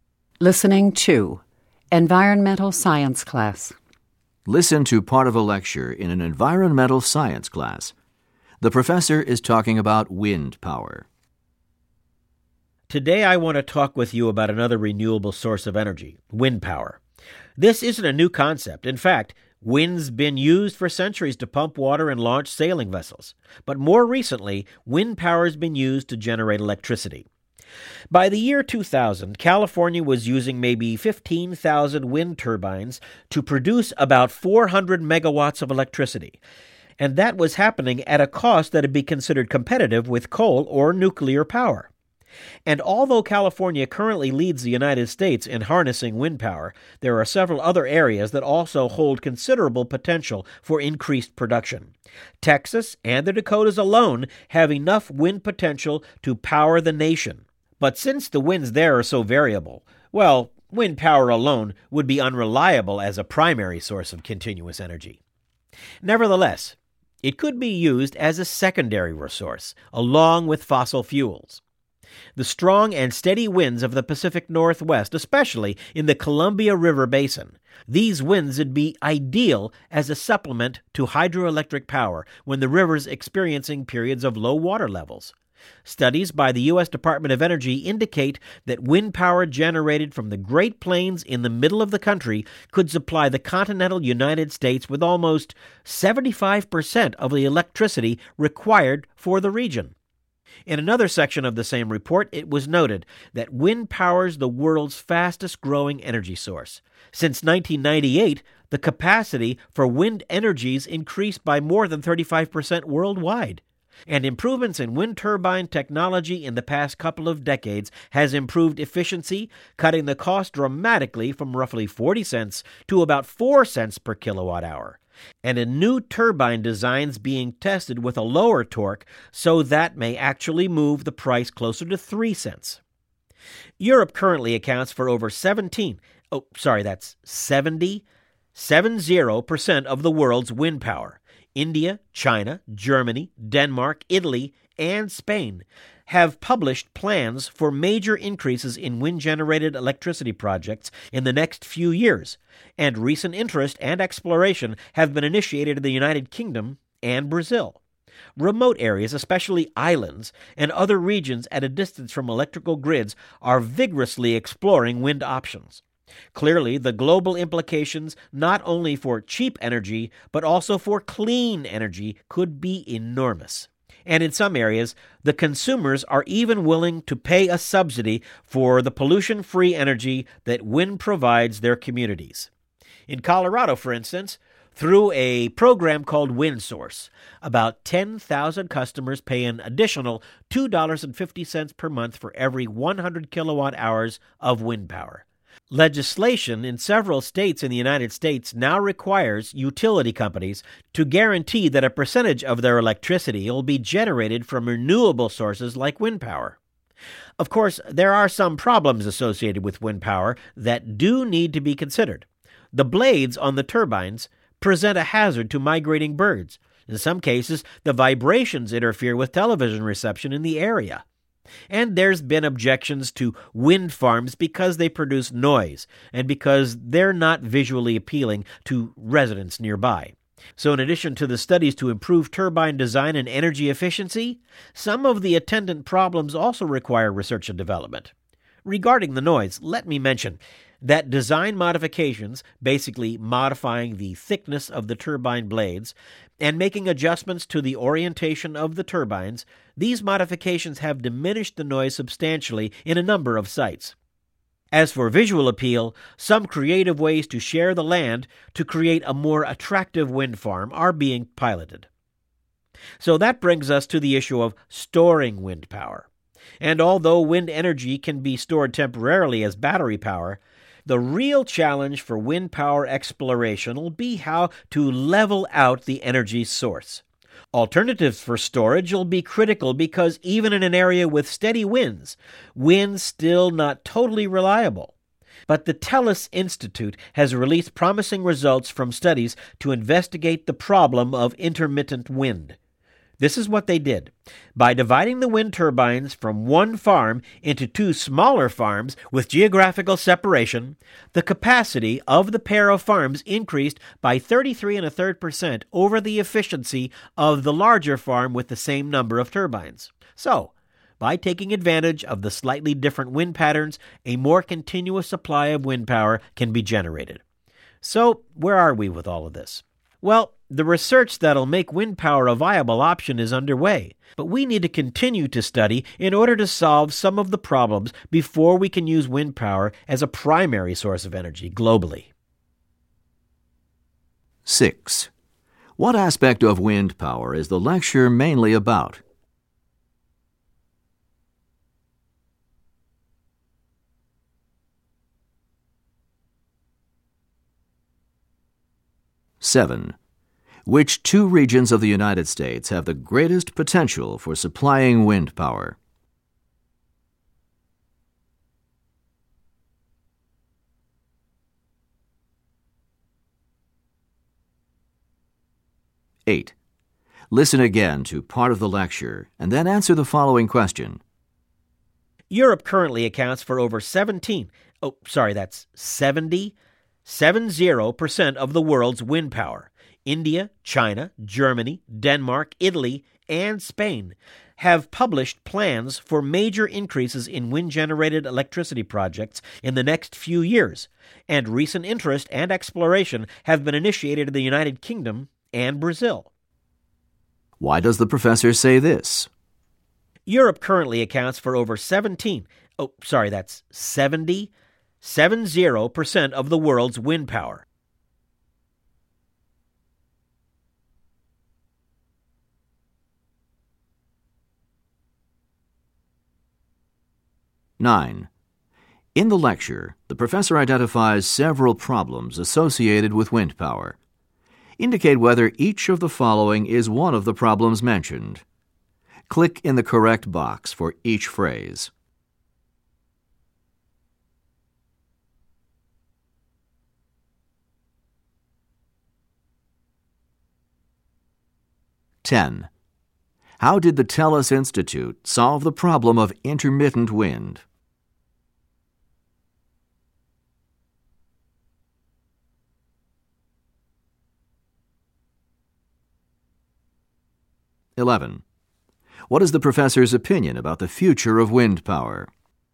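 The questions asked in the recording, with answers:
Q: How did the TELUS Institute solve the problem of intermittent wind?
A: By dividing one wind farm into two smaller, geographically separated farms

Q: What is the professor's opinion about the future of wind power?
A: It is promising, but more research is needed before it can be a primary energy source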